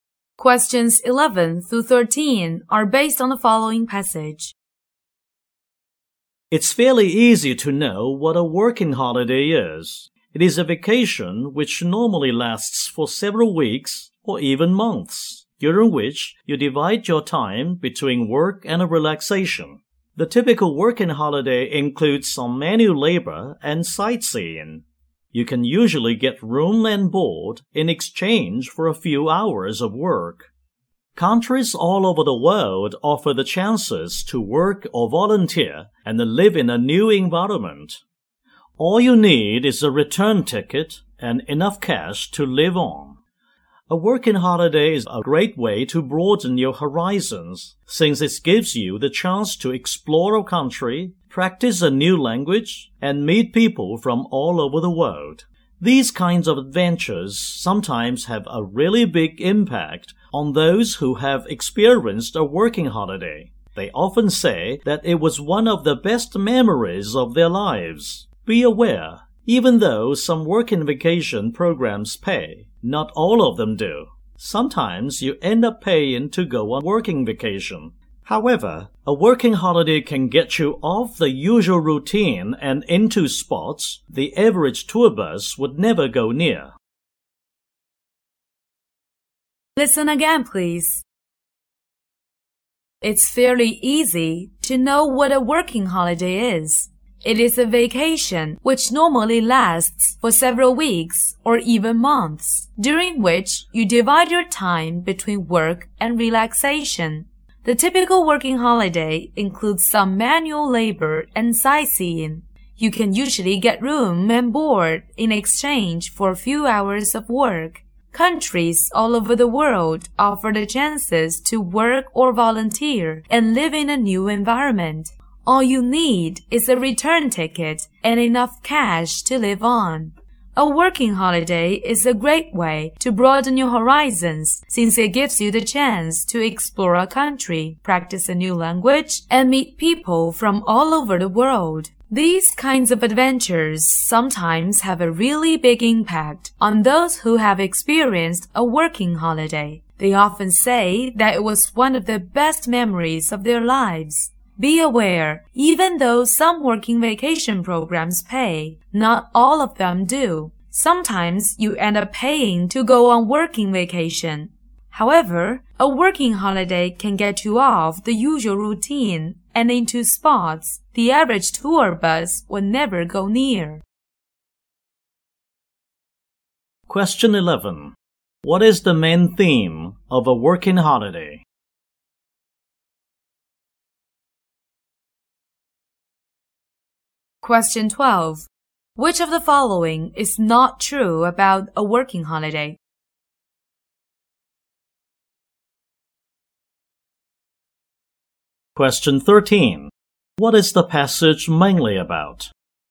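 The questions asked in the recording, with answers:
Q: What is the main theme of a working holiday?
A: Dividing time between work and relaxation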